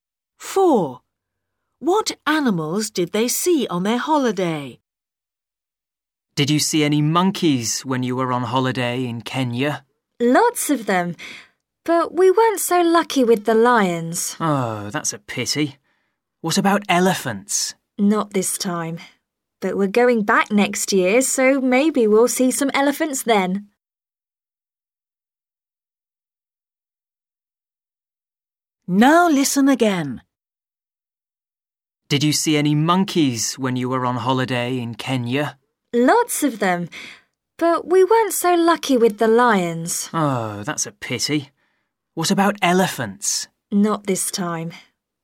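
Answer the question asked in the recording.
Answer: monkeys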